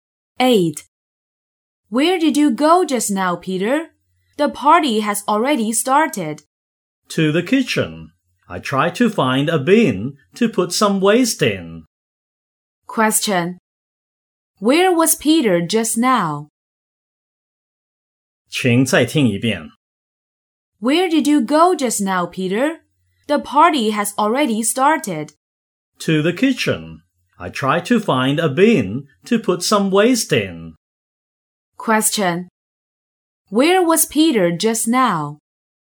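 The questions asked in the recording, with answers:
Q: Where was Peter just now?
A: In the kitchen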